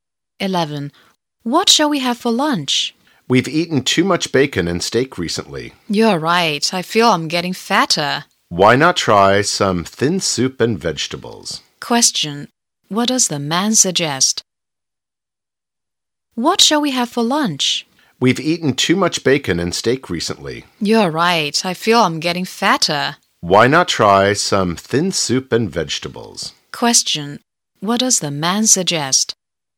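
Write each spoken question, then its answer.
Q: What does the man suggest?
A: Having thin soup and vegetables for lunch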